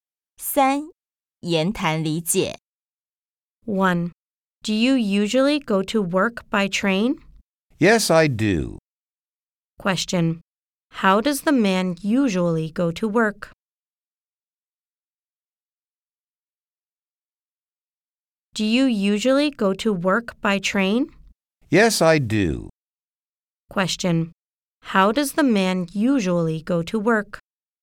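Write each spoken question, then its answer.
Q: Question. How does the man usually go to work?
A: By train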